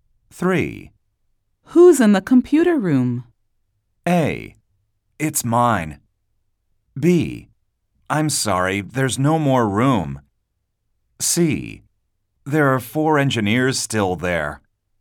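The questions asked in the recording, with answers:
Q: Who's in the computer room?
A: C: There are 4 engineers still there.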